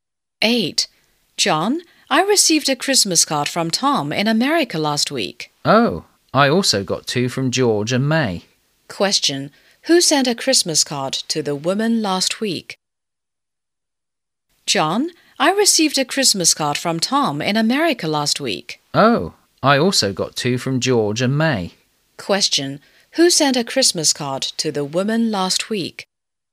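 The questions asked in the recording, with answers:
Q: Question, who sent a Christmas card to the woman last week?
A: Tom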